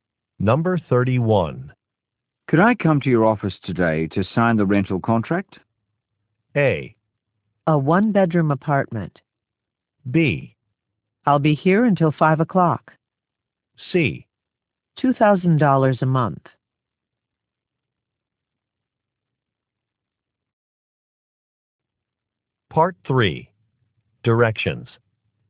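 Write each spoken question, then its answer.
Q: Could I come to your office today to sign the rental contract?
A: B: I'll be here until 5 o'clock.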